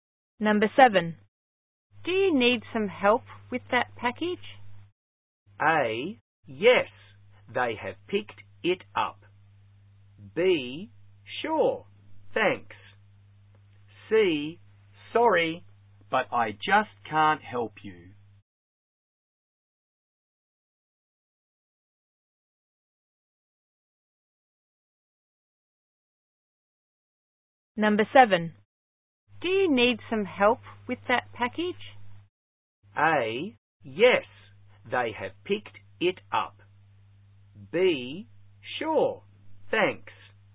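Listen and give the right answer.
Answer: B: sure, thanks.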